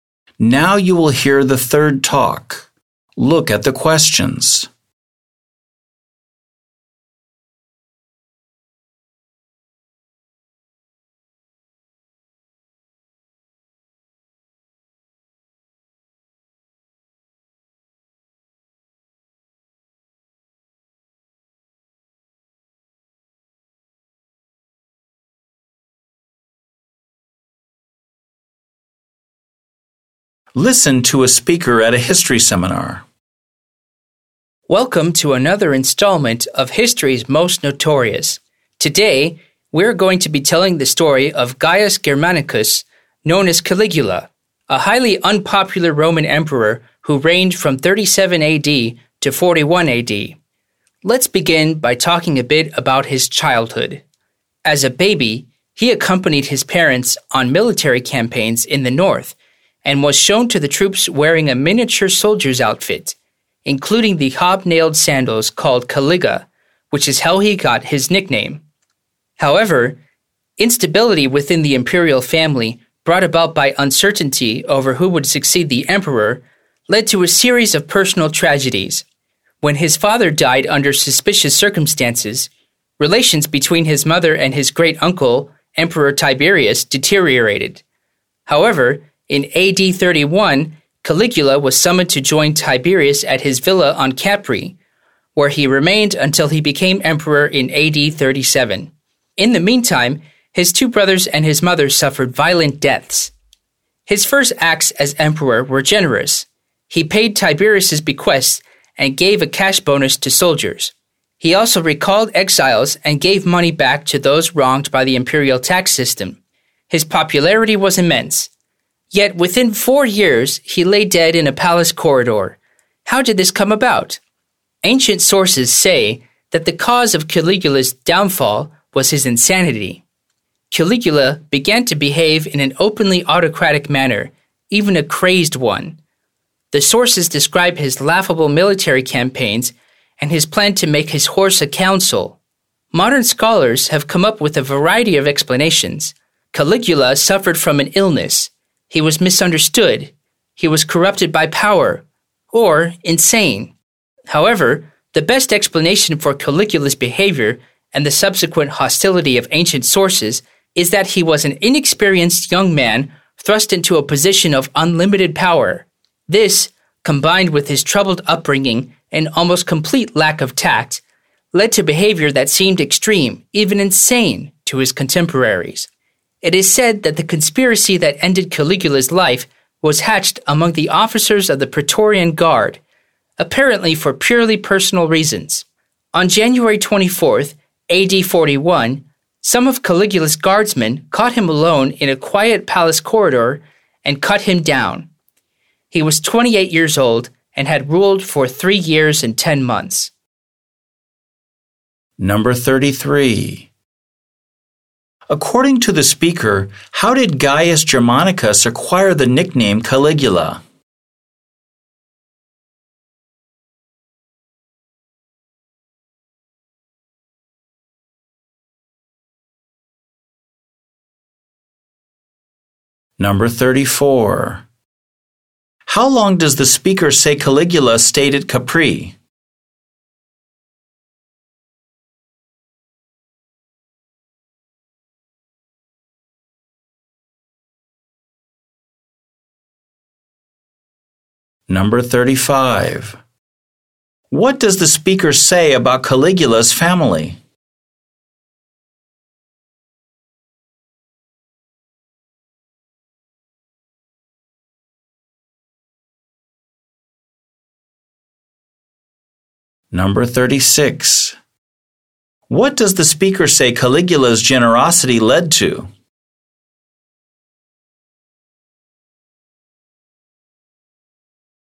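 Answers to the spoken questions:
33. From the miniature soldier's sandals (caliga) he wore as a baby
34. About six years (AD 31 to AD 37)
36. Immense popularity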